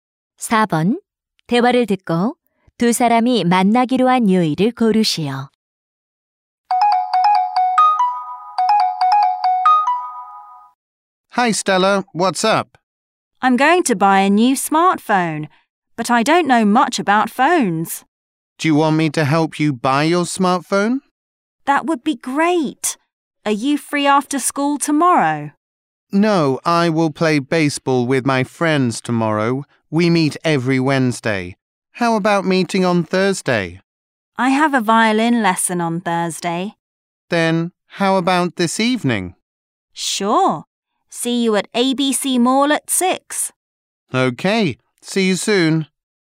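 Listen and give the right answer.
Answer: 화요일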